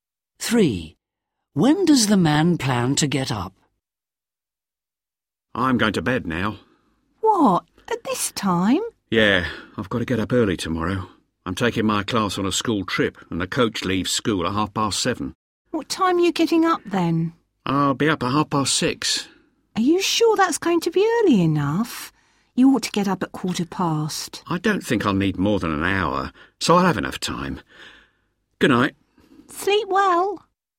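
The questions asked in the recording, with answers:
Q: When does the man plan to get up?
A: At 6:30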